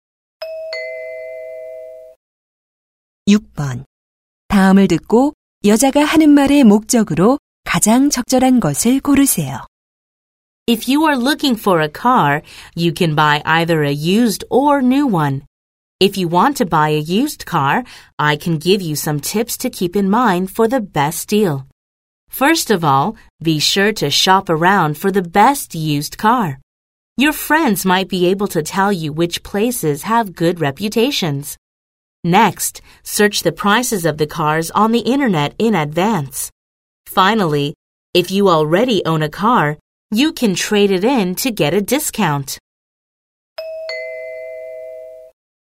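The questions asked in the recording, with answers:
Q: 다음을 듣고 여자가 하는 말의 목적으로 가장 적절한 것을 고르세요.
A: 중고차 구입 요령을 알려 주려고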